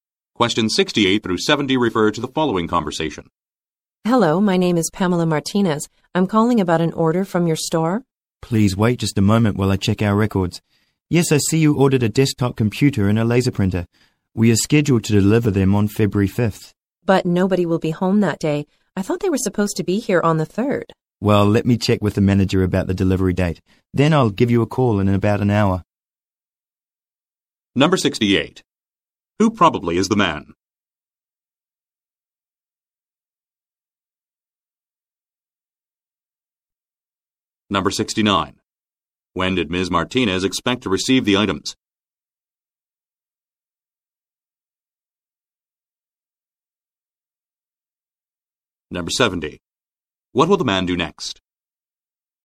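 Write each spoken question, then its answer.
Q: Who probably is the man?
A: A store employee

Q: When did Ms. Martinez expect to receive the items?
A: On the 3rd

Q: What will the man do next?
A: Check with the manager about the delivery date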